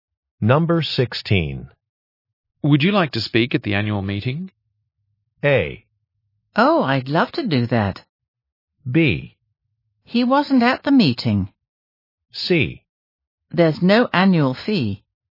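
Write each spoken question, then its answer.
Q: Would you like to speak at the annual meeting?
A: A: Oh, I'd love to do that.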